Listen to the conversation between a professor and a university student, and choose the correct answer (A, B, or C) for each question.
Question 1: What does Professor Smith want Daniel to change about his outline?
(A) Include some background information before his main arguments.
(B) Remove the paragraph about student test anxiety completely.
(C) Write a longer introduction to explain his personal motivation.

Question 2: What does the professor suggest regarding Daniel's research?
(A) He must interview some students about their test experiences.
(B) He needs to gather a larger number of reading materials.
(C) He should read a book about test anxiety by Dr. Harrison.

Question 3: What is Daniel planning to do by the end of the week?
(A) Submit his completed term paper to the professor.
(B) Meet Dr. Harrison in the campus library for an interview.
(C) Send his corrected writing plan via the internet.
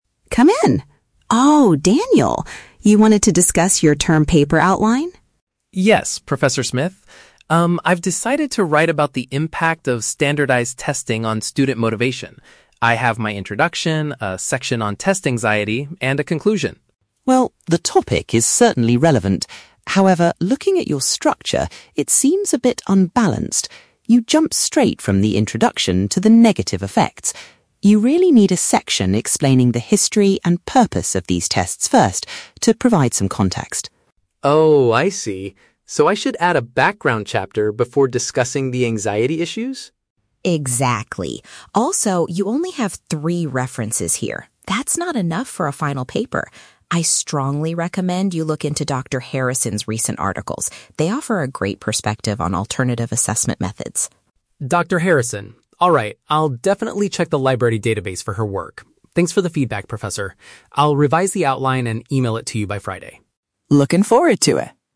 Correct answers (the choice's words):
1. Include some background information before his main arguments.
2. He needs to gather a larger number of reading materials.
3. Send his corrected writing plan via the internet.

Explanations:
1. The professor tells Daniel he needs a section explaining the "history and purpose... to provide some context". Daniel confirms by asking if he should add a "background chapter". Option A paraphrases this requirement. The Trap: Option (B) contains the words "test anxiety", but the professor does not want him to remove it; she just wants another section before it. Option (C) mentions "introduction" and "motivation" (words from the audio), but they are combined incorrectly.
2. The professor states, "you only have three references here. That's not enough". Option B paraphrases "more references" as "a larger number of reading materials". The Trap: Option (C) is a trap. Dr. Harrison is mentioned, but her articles are about "alternative assessment methods", not "test anxiety". Option (A) is plausible for a research paper but is never mentioned.
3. Daniel promises to "revise the outline and email it to you by Friday". Option C paraphrases "revise the outline" as "corrected writing plan" and "email it" as "via the internet". The Trap: Option (A) is a trap. He is submitting the outline (the plan) on Friday, not the comple

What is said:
Professor Smith: Come in. Oh, Daniel. You wanted to discuss your term paper outline?
Daniel: Yes, Professor Smith. Um, I've decided to write about the impact of standardized testing on student motivation. I have my introduction, a section on test anxiety, and a conclusion.
Professor Smith: Well, the topic is certainly relevant. However, looking at your structure, it seems a bit unbalanced. You jump straight from the introduction to the negative effects. You really need a section explaining the history and purpose of these tests first, to provide some context.
Daniel: Oh, I see. So I should add a background chapter before discussing the anxiety issues?
Professor Smith: Exactly. Also, you only have three references here. That's not enough for a final paper. I strongly recommend you look into Dr. Harrison's recent articles. They offer a great perspective on alternative assessment methods.
Daniel: Dr. Harrison... alright, I'll definitely check the library database for her work. Thanks for the feedback, Professor. I'll revise the outline and email it to you by Friday.